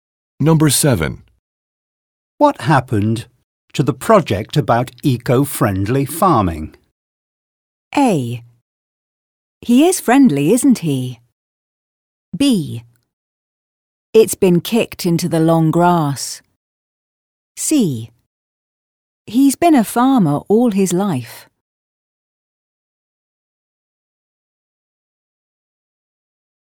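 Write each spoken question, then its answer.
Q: What happened to the project about eco-friendly farming?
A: B: It's been kicked into the long grass.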